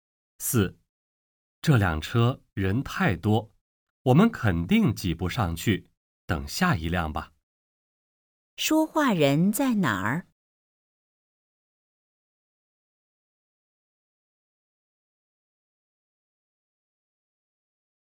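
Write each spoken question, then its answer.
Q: 说话人在哪儿?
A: 车站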